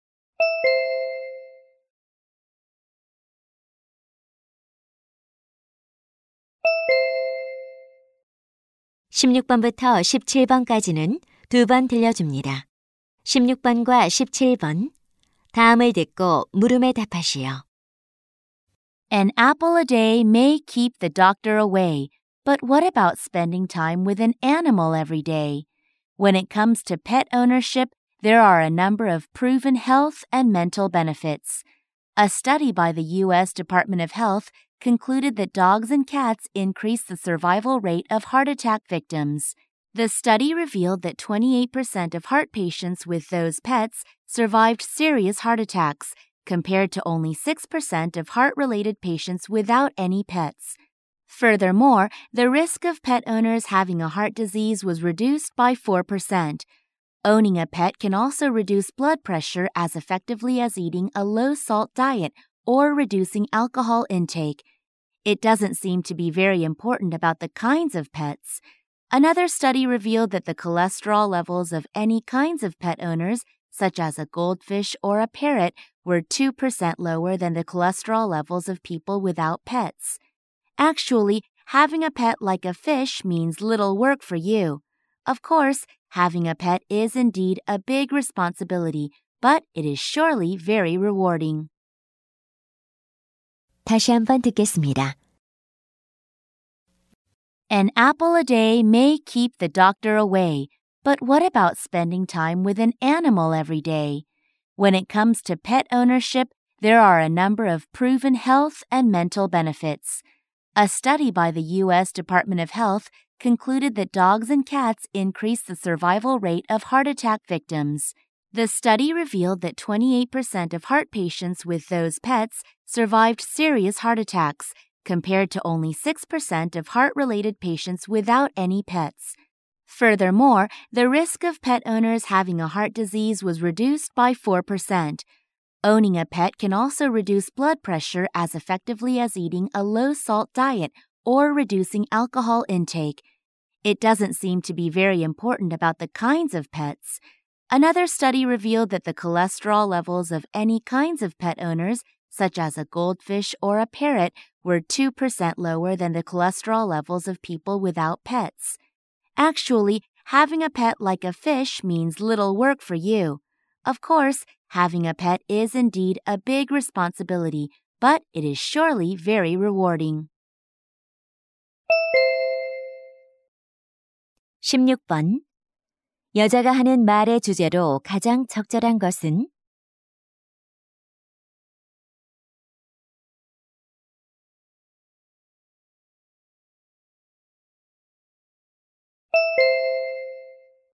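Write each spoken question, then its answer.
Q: 여자가 하는 말의 주제로 가장 적절한 것은?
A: 애완동물을 기르는 것의 건강상 이점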